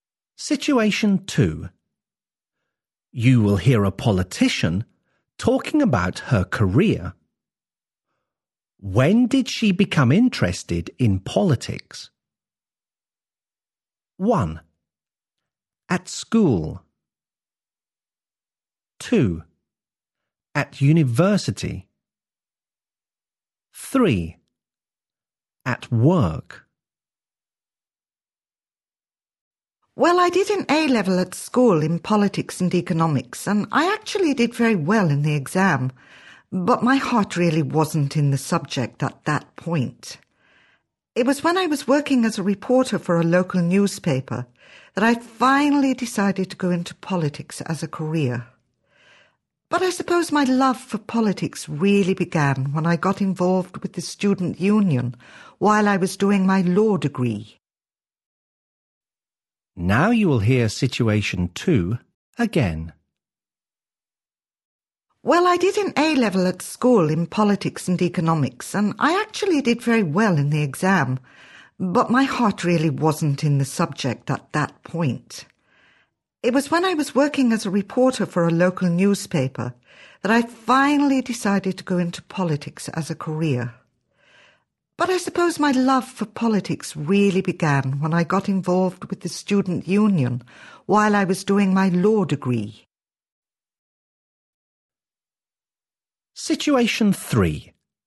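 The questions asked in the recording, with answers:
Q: When did she become interested in politics?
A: 2: At university.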